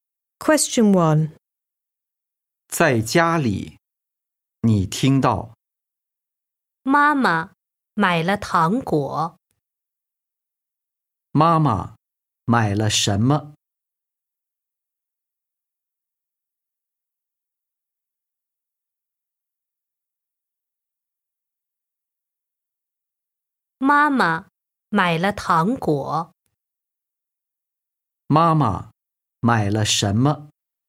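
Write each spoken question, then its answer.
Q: 妈妈买了什么?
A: 糖果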